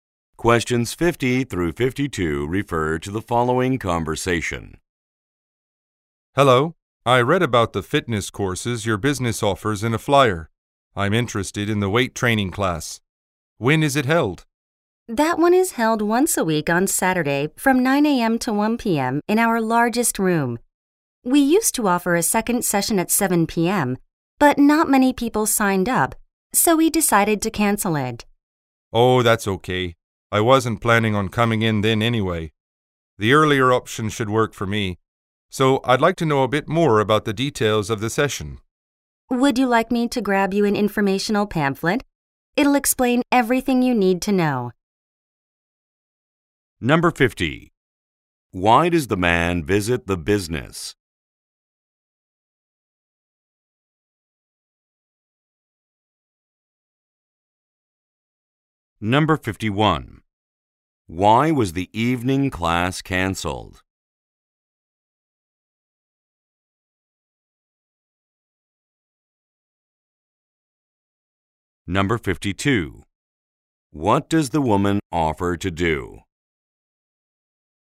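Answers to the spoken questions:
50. To ask about the weight training class
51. Few people signed up
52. Get him a pamphlet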